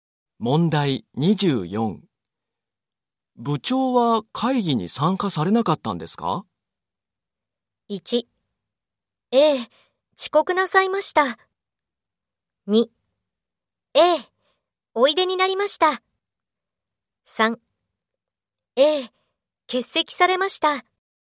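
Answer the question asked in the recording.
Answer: 3: ええ、欠席されました。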